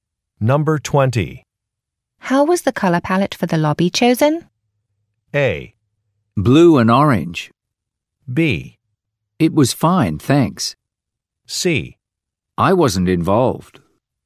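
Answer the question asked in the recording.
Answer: C: I wasn't involved.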